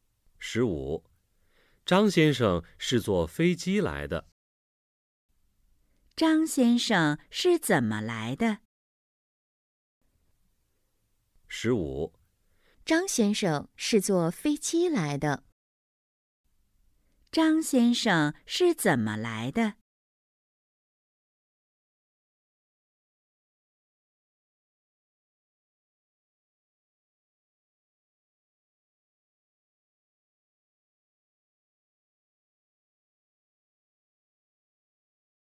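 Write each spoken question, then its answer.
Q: 张先生是怎么来的?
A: 坐飞机来的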